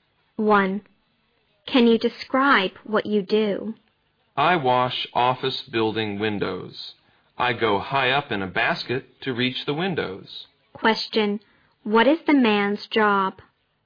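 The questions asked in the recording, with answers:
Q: Question, what is the man's job?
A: He washes office building windows (window cleaner).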